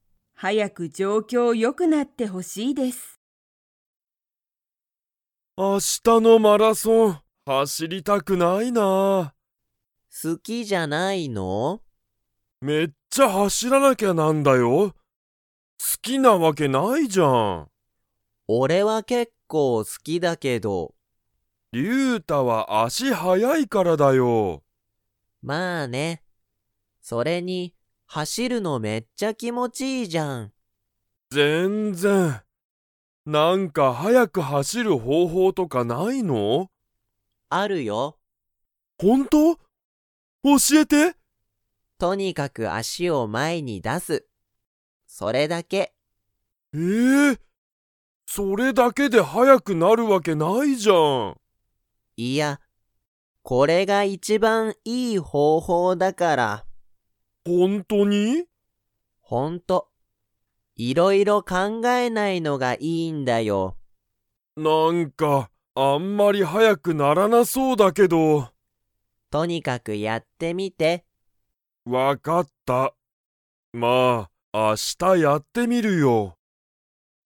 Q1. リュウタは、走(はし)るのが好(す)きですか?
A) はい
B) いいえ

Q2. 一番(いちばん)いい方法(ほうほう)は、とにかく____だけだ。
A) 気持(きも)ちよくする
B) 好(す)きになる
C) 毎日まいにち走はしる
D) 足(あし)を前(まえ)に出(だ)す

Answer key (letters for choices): 1A, 2D

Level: Level 2